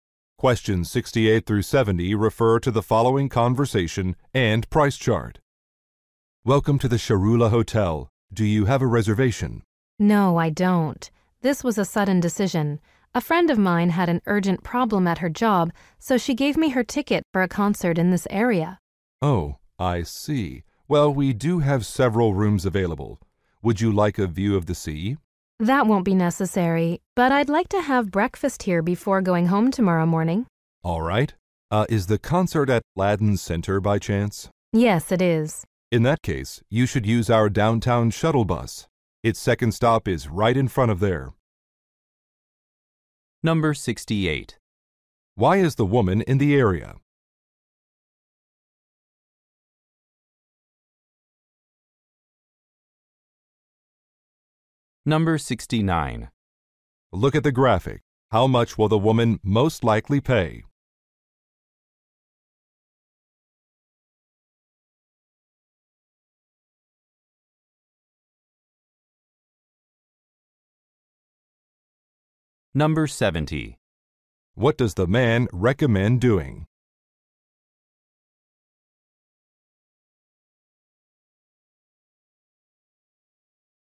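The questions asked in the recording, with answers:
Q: Why is the woman in the area?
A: To attend a concert.

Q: What does the man recommend doing?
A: Using the hotel's downtown shuttle bus.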